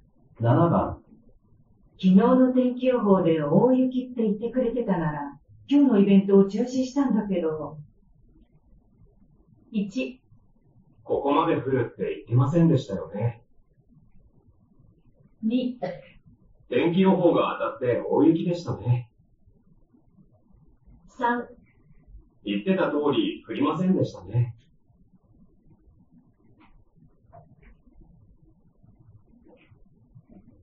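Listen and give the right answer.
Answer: 1: ここまで降るって言ってませんでしたよね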